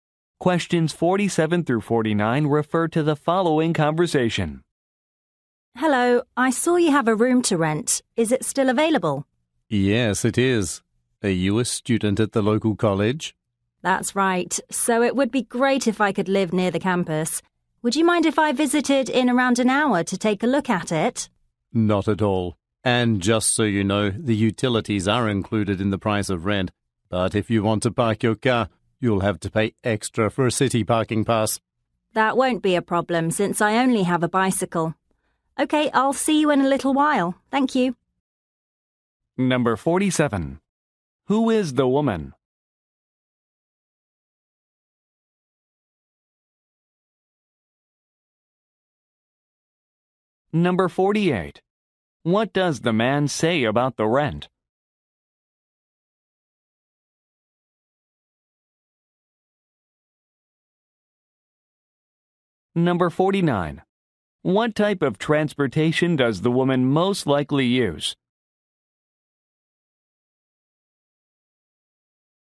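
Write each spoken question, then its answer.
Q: Who is the woman?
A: A student at the local college

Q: What does the man say about the rent?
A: Utilities are included

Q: What type of transportation does the woman most likely use?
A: A bicycle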